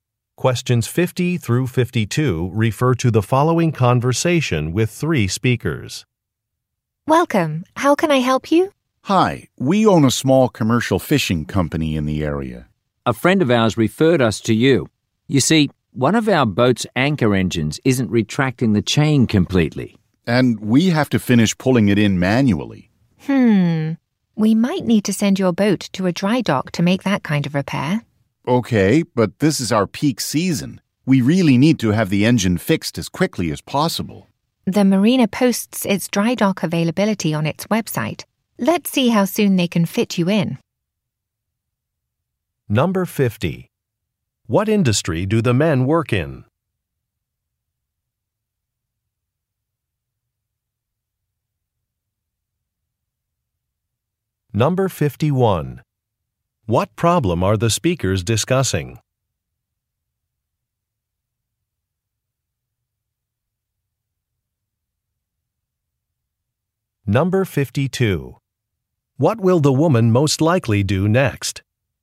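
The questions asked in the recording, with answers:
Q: What industry do the men work in?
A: Commercial fishing

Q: What problem are the speakers discussing?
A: A boat's anchor engine isn't retracting the chain completely

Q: What will the woman most likely do next?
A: Check the marina's dry dock availability on its website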